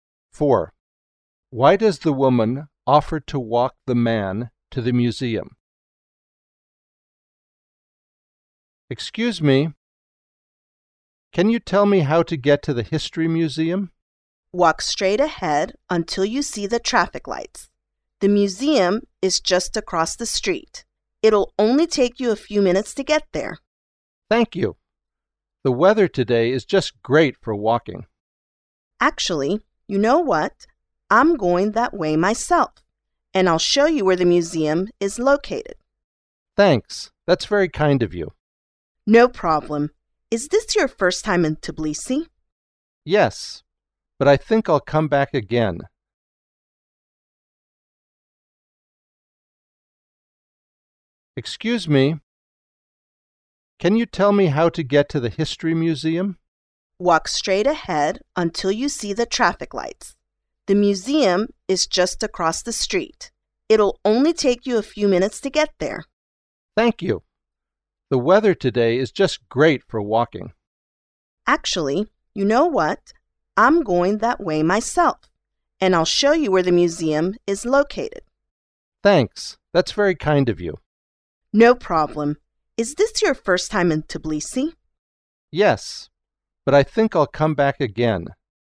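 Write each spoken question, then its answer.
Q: Why does the woman offer to walk the man to the museum?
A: She is going that way herself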